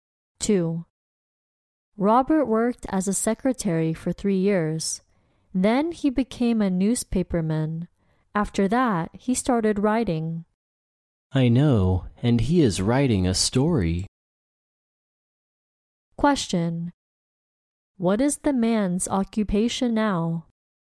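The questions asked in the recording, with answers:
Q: What is the man's occupation now?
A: Writer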